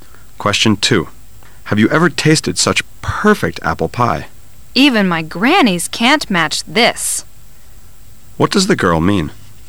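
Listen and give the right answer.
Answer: The apple pie is the best she has ever tasted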